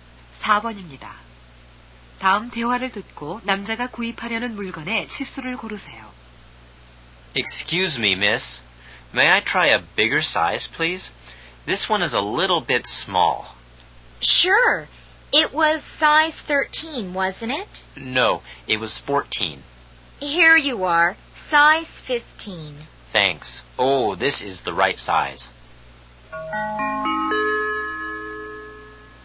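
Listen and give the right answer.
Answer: 15 사이즈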